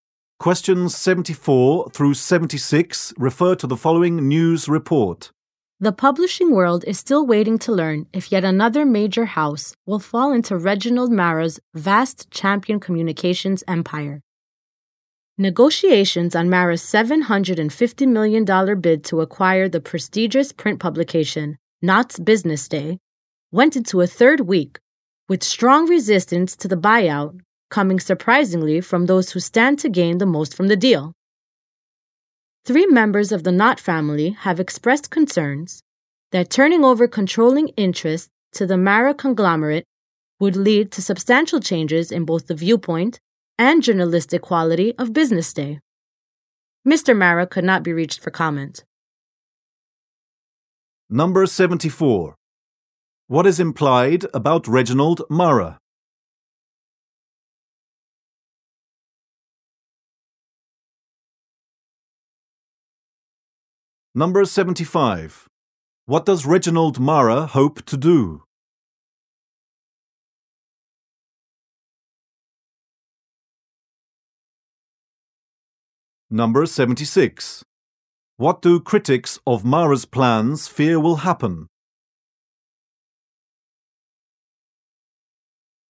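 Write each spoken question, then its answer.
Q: What does Reginald Mara hope to do?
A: Acquire Knott's Business Day

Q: What do critics of Mara's plans fear will happen?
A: The viewpoint and journalistic quality of Business Day will change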